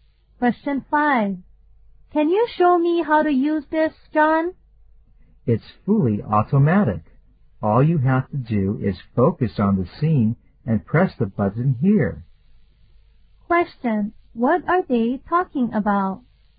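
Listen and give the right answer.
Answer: An automatic camera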